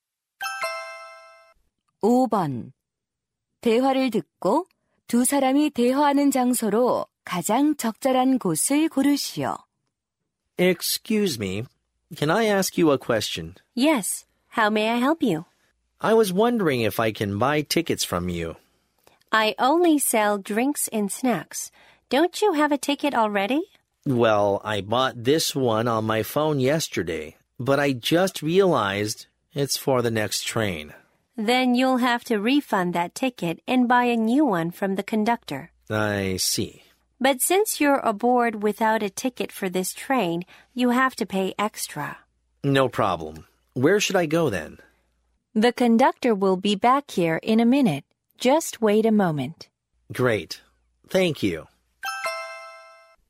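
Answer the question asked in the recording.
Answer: 기차 안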